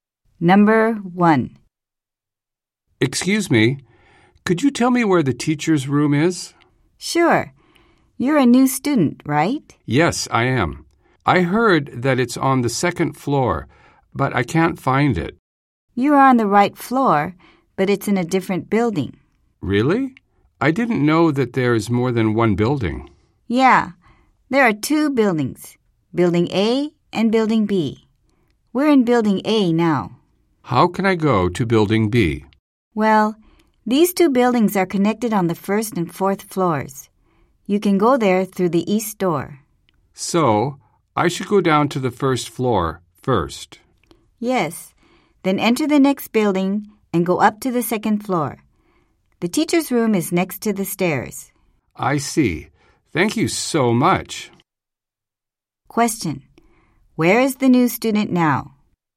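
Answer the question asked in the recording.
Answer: On the second floor of Building A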